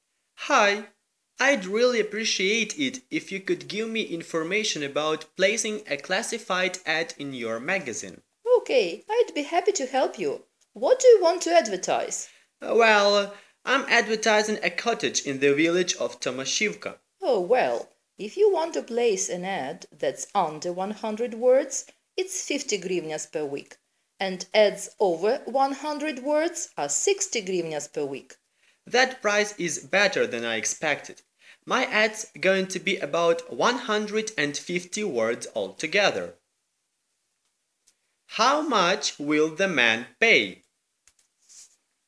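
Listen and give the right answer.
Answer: 60 hryvnias per week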